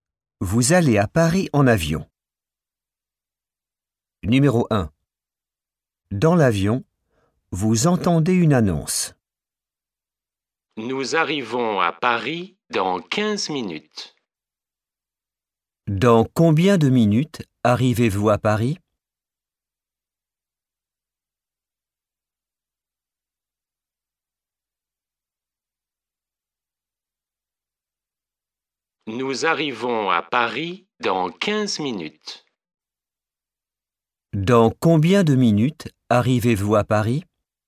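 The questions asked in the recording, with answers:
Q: Dans combien de minutes arrivez-vous à Paris?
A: 15 minutes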